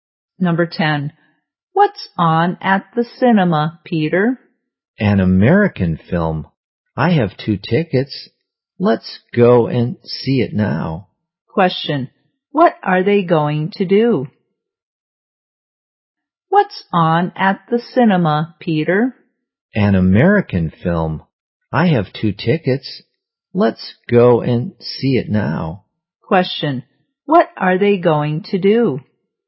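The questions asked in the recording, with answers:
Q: Question. What are they going to do?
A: See an American film at the cinema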